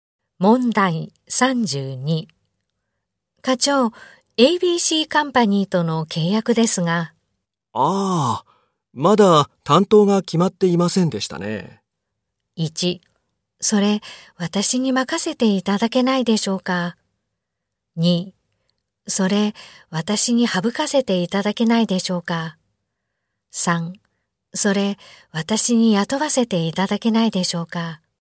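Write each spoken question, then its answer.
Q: 課長、ABC カンパニーとの契約ですが。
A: 1: それ、私に任せていただけないでしょうか。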